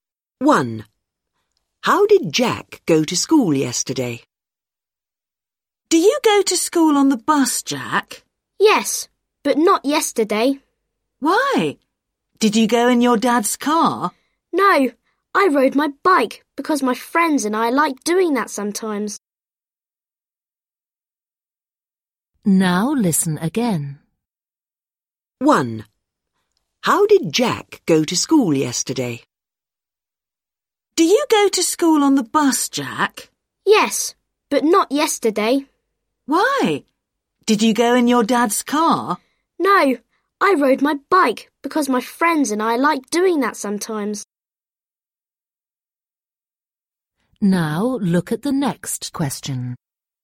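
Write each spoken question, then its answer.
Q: How did Jack go to school yesterday?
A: By bike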